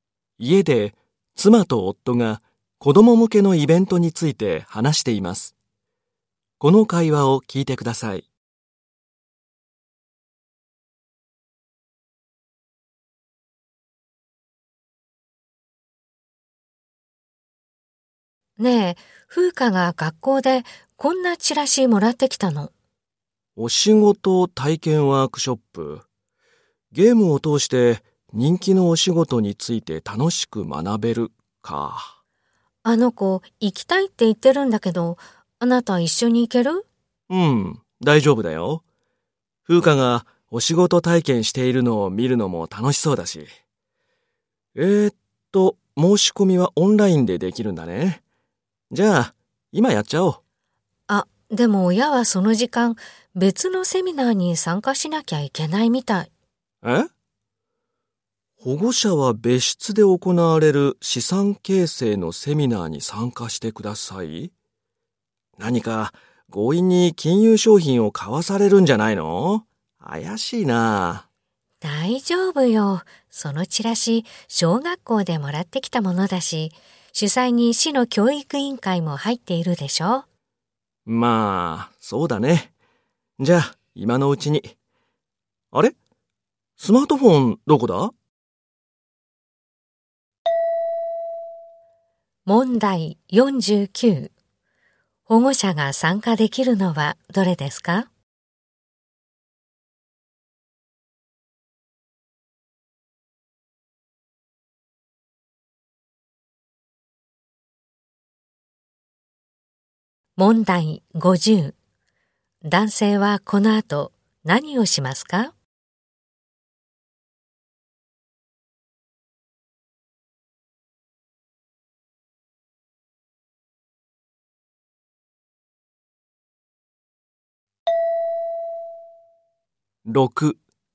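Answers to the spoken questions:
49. 資産形成のセミナー
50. スマートフォンを探す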